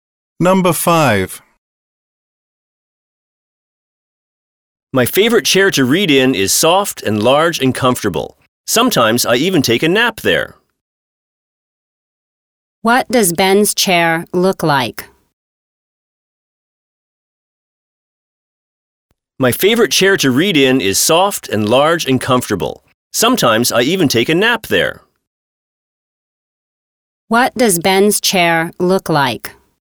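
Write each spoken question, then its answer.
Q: What does Ben's chair look like?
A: Soft, large and comfortable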